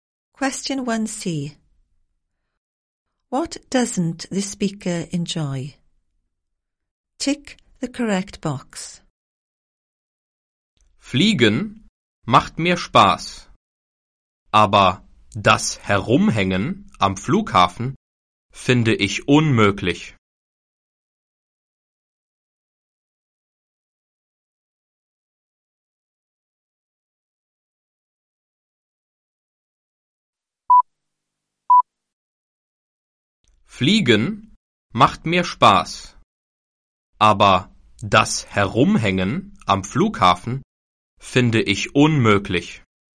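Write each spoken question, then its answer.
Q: What doesn't the speaker enjoy?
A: Hanging around at the airport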